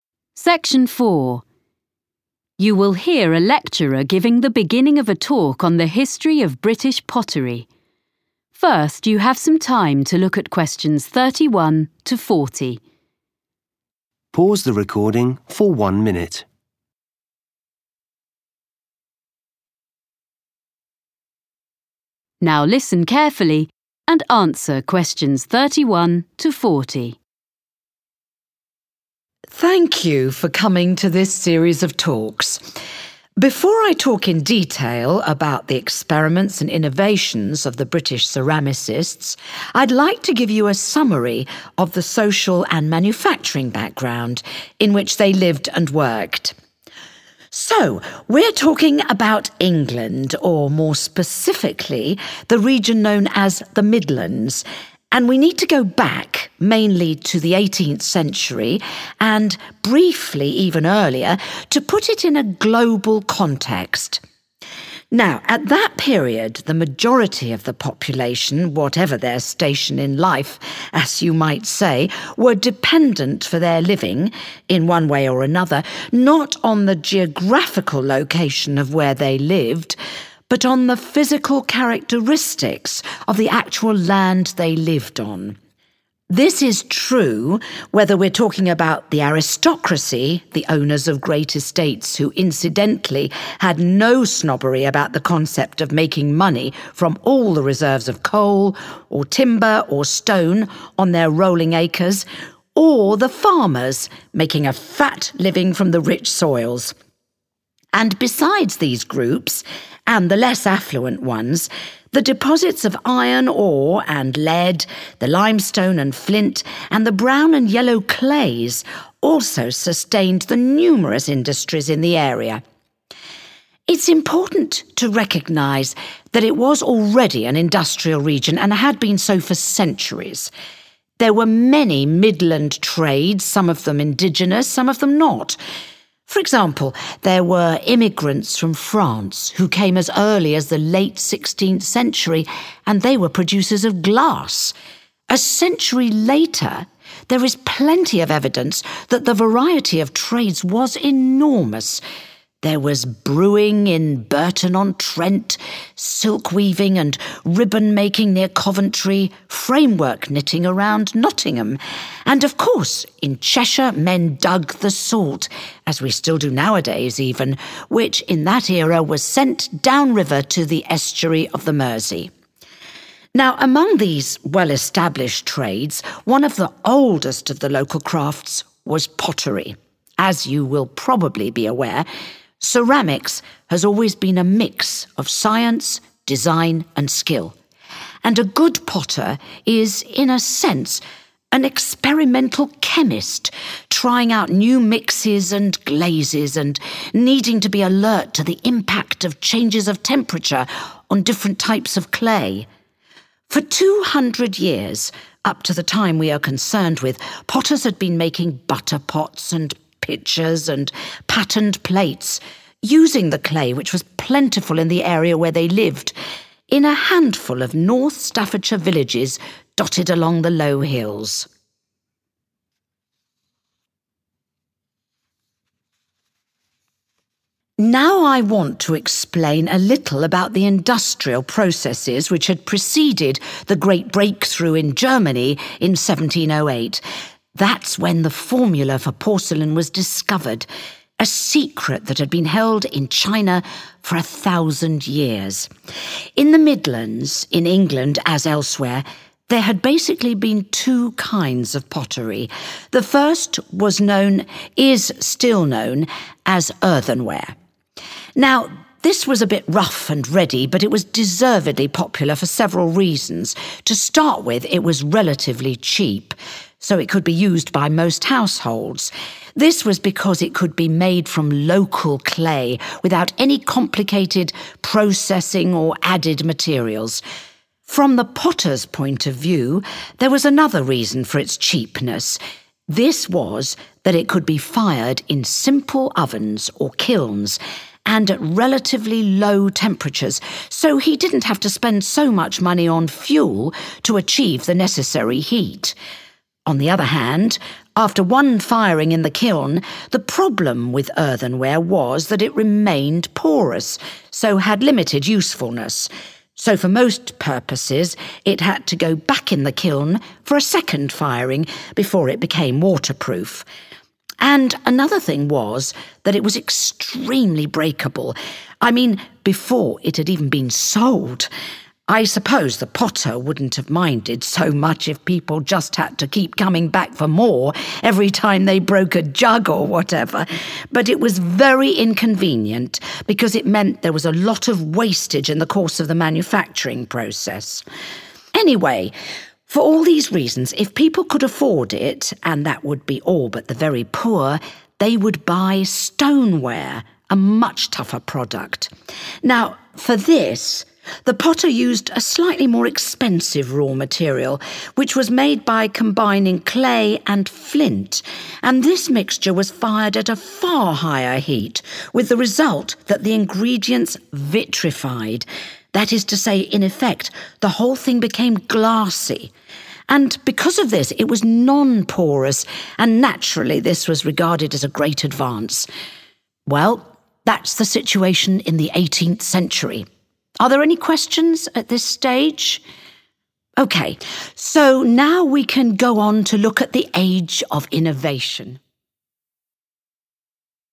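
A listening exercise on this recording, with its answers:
Questions 31-35 Complete the sentences below. Write ONLY ONE WORD for each answer.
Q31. In the eighteenth century, the 31 still determined how most people made a living.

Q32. In the ground were minerals which supported the many 32 of the region.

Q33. Since the late sixteenth century the French settlers had made 33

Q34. In Cheshire 34 was mined and transported on the river Mersey.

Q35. Potters worked in a few 35 situated on the small hills of North Staffordshire.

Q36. – potters used 36 clay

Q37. – saved money on 37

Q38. – needed two firings in the kiln to be 38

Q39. – fragility led to high 39 during manufacturing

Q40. – made from a 40 of clay and flint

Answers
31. land
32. industries
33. glass
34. salt
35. villages
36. local
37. fuel
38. waterproof
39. wastage
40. mixture

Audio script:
Thank you for coming to this series of talks. 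Before I talk in detail about the experiments and innovations of the British ceramicists, I'd like to give you a summary of the social and manufacturing background in which they lived and worked.
So, we're talking about England, or more specifically, the region known as 'The Midlands', and we need to go back, mainly to the eighteenth century and, briefly, even earlier, to put it in a global context.
Now, at that period the majority of the population, whatever their station in life, as you might say, were dependent for their living, in one way or another not on the geographical location of where they lived, (Q31)but on the physical characteristics of the actual land they lived on (=made a living).
This is true, whether we're talking about the aristocracy, the owners of great estates, who incidentally had no snobbery about the concept of making money from all the reserves of coal, or timber, or stone on their rolling acres, or the farmers making a fat living from the rich soils.
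(Q32) And besides these groups, and the less affluent ones, the deposits of iron ore and lead, the limestone and flint and the brown and yellow clays (=minerals) also sustained the numerous (=many) industries in the area.
It's important to recognise that it was already an industrial region, and had been so for centuries. There were many Midland trades, some of them indigenous, some of them not.
(Q33) For example, there were immigrants from France (=French settlers) who came as early as the late sixteenth century and they were producers of glass. A century later, there is plenty of evidence that the variety of trades was enormous: there was brewing in Burton-on-Trent; silk-weaving and ribbon-making near Coventry; framework knitting around Nottingham.
(Q34) And of course, in Cheshire men dug (=mined) the salt, as we still do nowadays even which in that era was sent (=transported) downriver to the estuary of the Mersey.
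Now, among these well-established trades, one of the oldest of the local crafts was pottery. As you will probably be aware, ceramics have always been a mix of science, design and skill, and a good potter is in a sense an experimental chemist, trying out new mixes and glazes, and needing to be alert to the impact of changes of temperature on different types of clay.
For two hundred years, up to the time we are concerned with, potters had been making butter pots and pitchers and patterned plates, (Q35) using the clay which was plentiful in the area where they lived -in a handful of North Staffordshire villages dotted along the low hills.
Now I want to explain a little about the industrial processes which had preceded the great breakthrough in Germany in 1708. That's when the formula for porcelain was discovered, a secret that had been held in China for a thousand years.
Questions
– potters used 36
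local
clay
fuel
waterproof
wastage
– more expensive but better
– made from a 40
mixture
In the Midlands, in England, as elsewhere, there had basically been two kinds of pottery. The first was known, and is still known, as 'earthenware'.
Now this was a bit rough and ready, but it was deservedly popular for several reasons. To start with, it was relatively cheap, so it could be used by most households. (Q36) This was because it could be made from local clay without any complicated processing or added materials.
From the potter's point of view there was another reason for its cheapness. (Q37) This was that it could be fired in simple ovens, or kilns, and at relatively low temperatures, so he didn't have to spend so much money (=save money) on fuel to achieve the necessary heat.
On the other hand, after one firing in the kiln, the problem with earthenware was that it remained porous so had limited usefulness. 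(Q38) So for most purposes it had to go back in the kiln for a second firing before it became waterproof.
And another thing was that it was extremely breakable -I mean, before it had even been sold.(Q39) I suppose the potter wouldn't have minded so much if people just had to keep coming back for more every time they broke a jug or whatever! -but it was very inconvenient because it meant there was a lot of wastage in the course of (=during) the manufacturing process.
Anyway, for all these reasons, if people could afford it, and that would be all but the very poor, they would buy stoneware,a much tougher product.
(Q40) Now, for this, the potter used a slightly more expensive raw material, which was made by combining clay and flint and this mixture was fired at a far higher heat, with the result that the ingredients vitrified, (Bây giờ, đối với việc này, người thợ gốm đã sử dụng một nguyên liệu thô đắt tiền hơn một chút, được tạo ra bằng cách kết hợp đất sét và đá lửa và hỗn hợp này được nung ở nhiệt độ cao hơn nhiều), that is to say, in effect the whole thing became glassy and because of this it was non-porous, and naturally, this was regarded as a great advance.
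Well, that's the situation in the eighteenth century. Are there any questions at this stage? So, now we can go on to look at the age of innovation.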